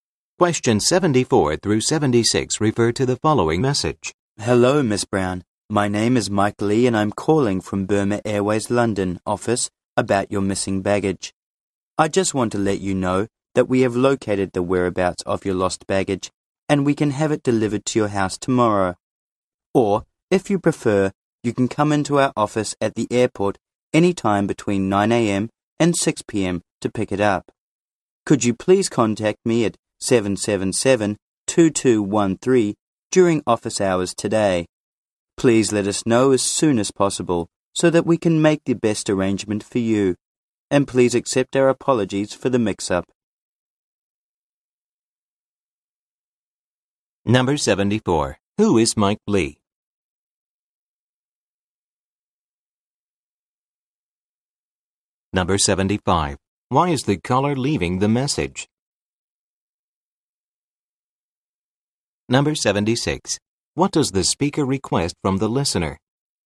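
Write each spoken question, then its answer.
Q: Who is Mike Lee?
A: An employee at the Burma Airways London office

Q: Why is the caller leaving the message?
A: Miss Brown's missing baggage has been found

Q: What does the speaker request from the listener?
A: To call him back during office hours today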